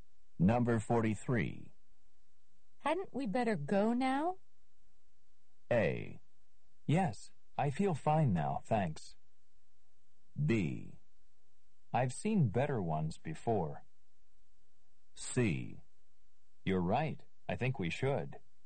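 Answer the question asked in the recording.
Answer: C: You're right, I think we should.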